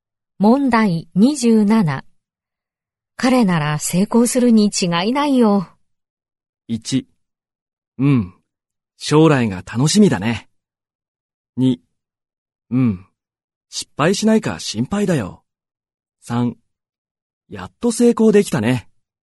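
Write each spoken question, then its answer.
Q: 彼なら成功するに違いないよ。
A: 1: うん、将来が楽しみだね。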